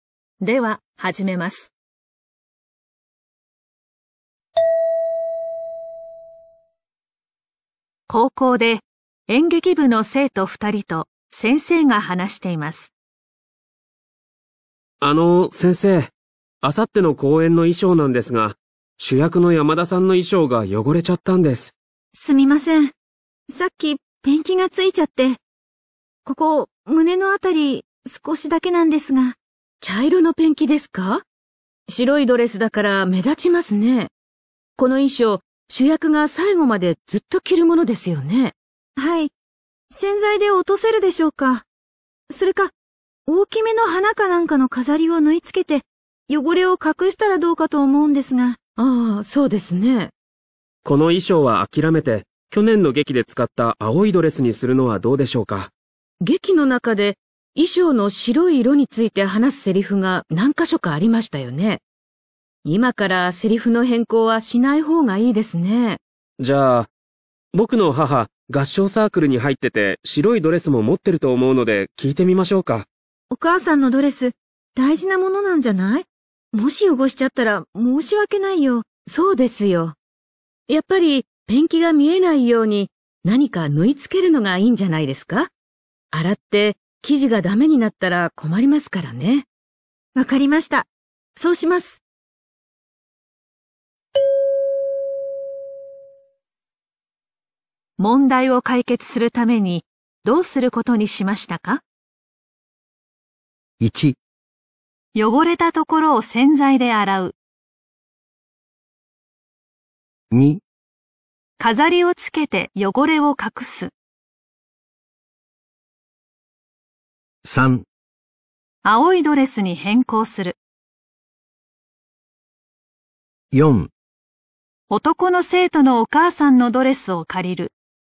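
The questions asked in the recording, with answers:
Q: 問題を解決するためにどうすることにしましたか?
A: 2: 飾りをつけて汚れを隠す。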